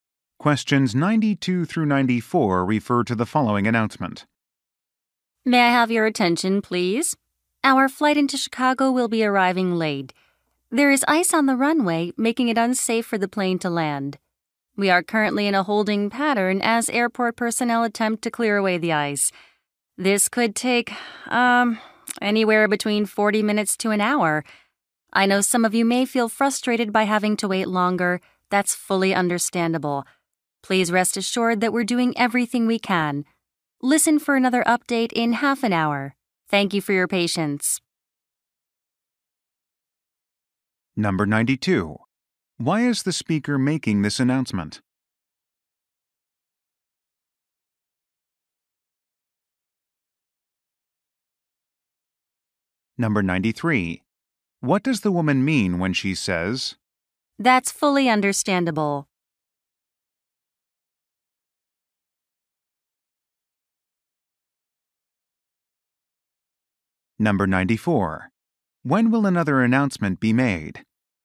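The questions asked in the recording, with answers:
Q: Why is the speaker making this announcement?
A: To announce the flight's late arrival due to ice on the runway

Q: What does the woman mean when she says,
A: She sympathizes with passengers' frustration

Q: When will another announcement be made?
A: In half an hour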